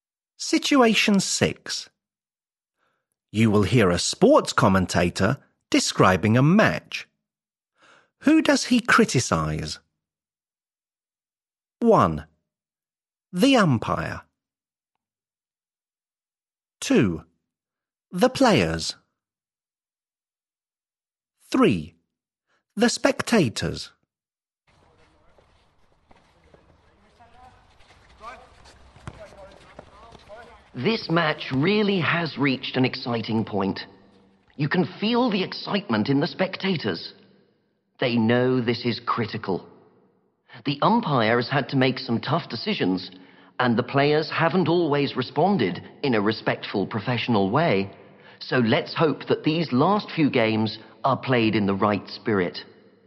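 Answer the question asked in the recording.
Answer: 2: The players.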